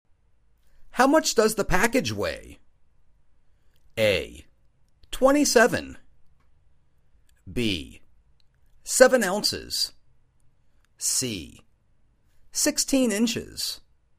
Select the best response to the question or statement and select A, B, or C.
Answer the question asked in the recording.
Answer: Seven ounces.